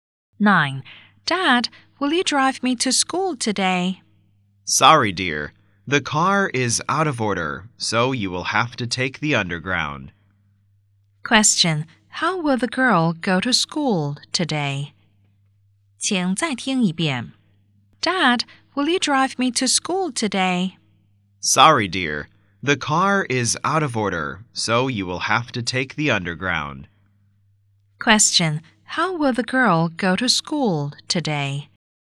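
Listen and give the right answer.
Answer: By underground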